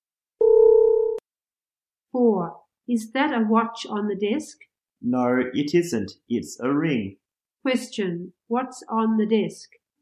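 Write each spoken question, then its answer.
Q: What's on the desk?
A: A ring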